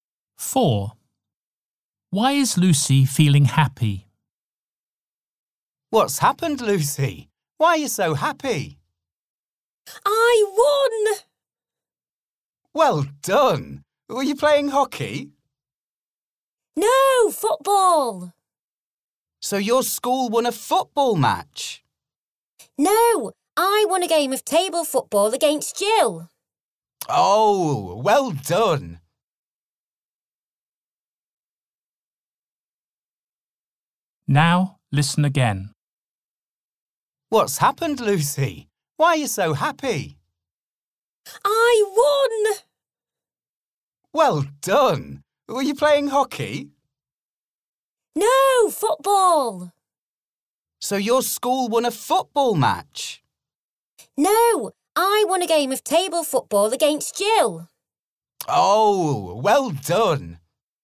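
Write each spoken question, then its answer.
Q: Why is Lucy feeling happy?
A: She won a game of table football against Jill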